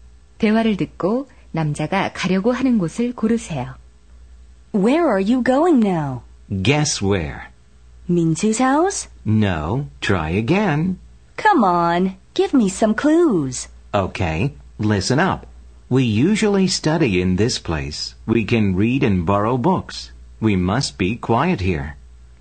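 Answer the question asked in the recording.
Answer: 도서관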